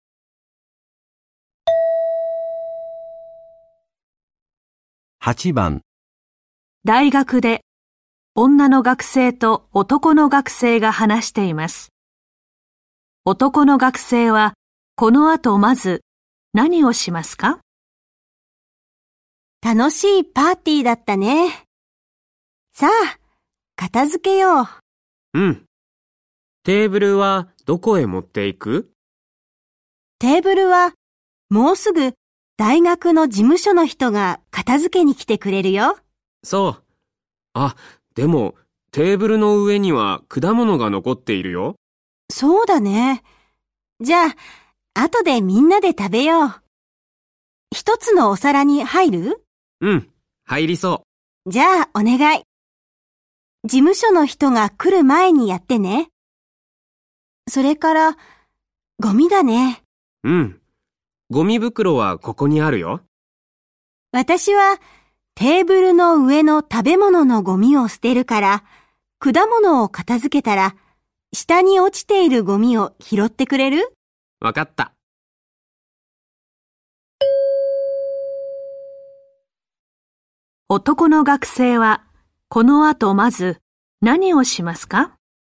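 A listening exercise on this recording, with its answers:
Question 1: 男学生接下来要先做什么呢?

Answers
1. 果物を一つのお皿に入れる

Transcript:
男の学生はこのあとまず何をしますか。
女:楽しいパーティーだったね。
さあ、片付けよう。
男:うん、テーブルはどこへ持っていく?
女:テーブルはもうすぐ大学の事務所の人が片付けに来てくれるよ。
男:そう。
あ、でもテーブルの上には果物が残っているよ。
女:そうだね。
じゃあ、あとで皆で食べよう。一つのお皿に入る?
一つのお皿に入る?
男:うん、入りそう。
女:じゃ、お願い。
事務所の人が来る前にやってね。
それから、ゴミだね。
男:うん、ゴミ袋はここにあるよ。
女:私はテーブルの上の食べ物のゴミを捨てるから、果物を片付けたら、下に落ちているごみを拾ってくれる?
男:分かった。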